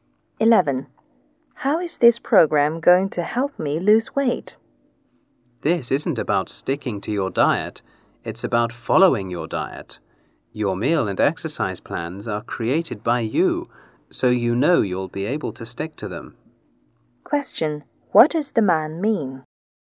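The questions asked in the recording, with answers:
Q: What does the man mean?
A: The user creates the meal and exercise plans, so they are achievable and easy to stick to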